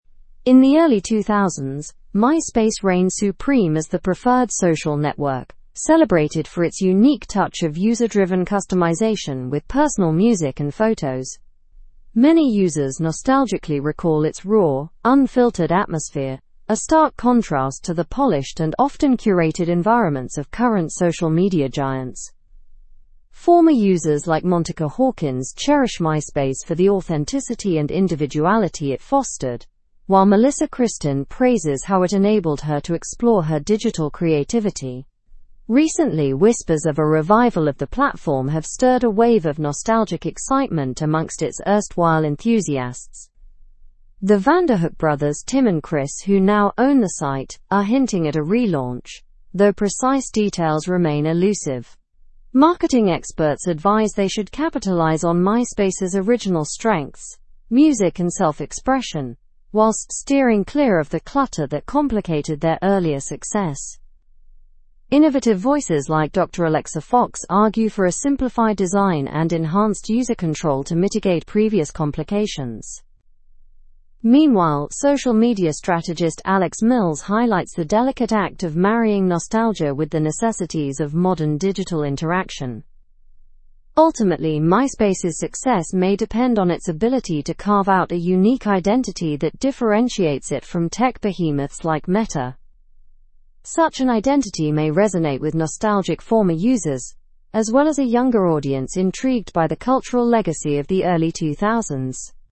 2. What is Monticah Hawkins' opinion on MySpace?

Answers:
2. She values it for its authenticity and individuality.

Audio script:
In the early 2000s, MySpace reigned supreme as the preferred social network, celebrated for its unique touch of user-driven customization with personal music and photos. Many users nostalgically recall its raw, unfiltered atmosphere, a stark contrast to the polished and often curated environments of current social media giants.
Former users like Monticah Hawkins cherish MySpace for the authenticity and individuality it fostered, while Melissa Kristin praises how it enabled her to explore her digital creativity. Recently, whispers of a revival of the platform have stirred a wave of nostalgic excitement amongst its erstwhile enthusiasts.
The Vanderhook brothers, Tim and Chris, who now own the site, are hinting at a relaunch, though precise details remain elusive. Marketing experts advise they should capitalize on MySpace's original strengths—music and self-expression—whilst steering clear of the clutter that complicated their earlier success.
Innovative voices like Dr. Alexa Fox argue for a simplified design and enhanced user control to mitigate previous complications. Meanwhile, social media strategist Alex Mills highlights the delicate act of marrying nostalgia with the necessities of modern digital interaction.
Ultimately, MySpace's success may depend on its ability to carve out a unique identity that differentiates it from tech behemoths like Meta. Such an identity may resonate with nostalgic former users, as well as a younger audience intrigued by the cultural legacy of the early 2000s.

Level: Level 4